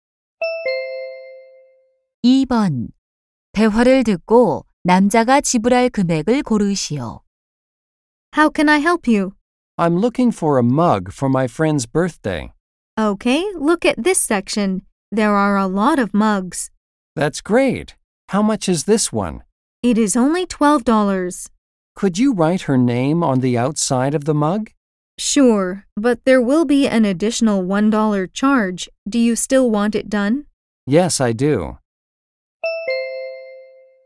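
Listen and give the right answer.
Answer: 13달러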